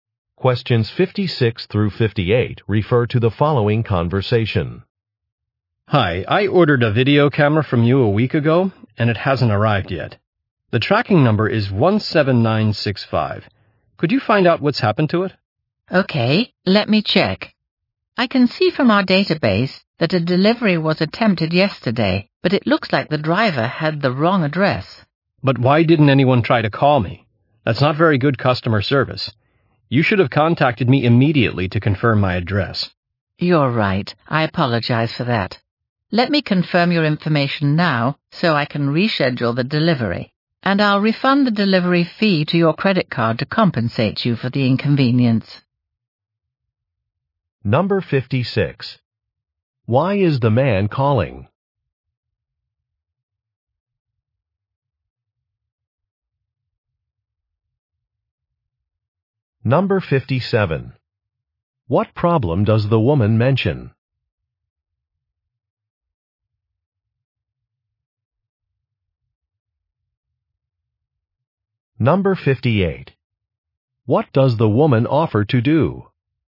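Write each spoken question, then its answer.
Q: Why is the man calling?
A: His video camera order hasn't arrived

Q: What does the woman offer to do?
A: Refund the delivery fee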